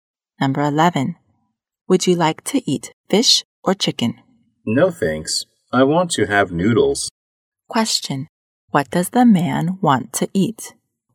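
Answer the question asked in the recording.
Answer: Noodles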